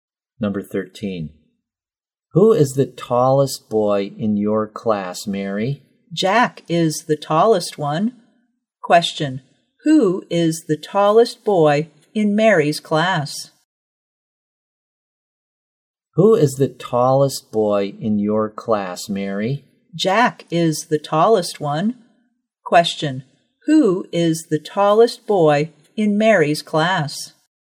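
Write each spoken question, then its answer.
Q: Question, who is the tallest boy in Mary's class?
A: Jack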